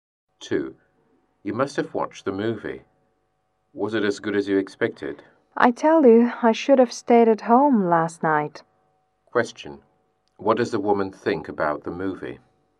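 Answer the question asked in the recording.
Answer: It was disappointing; not worth watching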